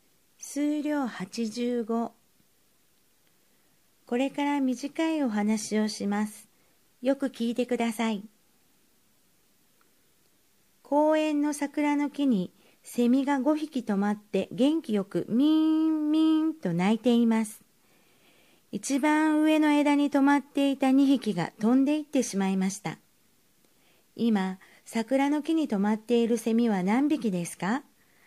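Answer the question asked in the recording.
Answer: 3匹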